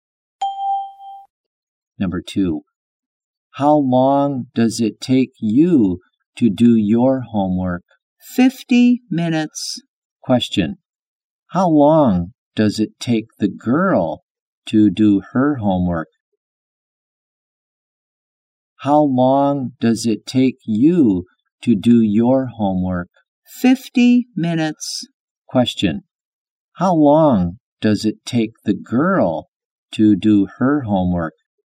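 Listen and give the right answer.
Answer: 50 minutes.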